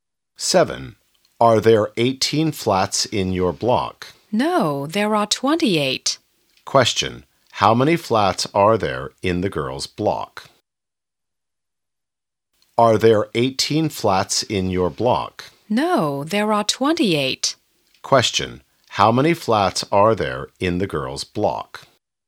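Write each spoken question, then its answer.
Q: how many flats are there in the girl's block?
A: 28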